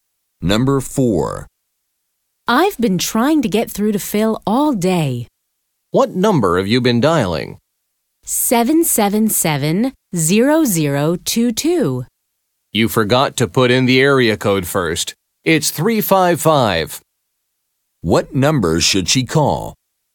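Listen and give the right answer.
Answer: 355-777-0022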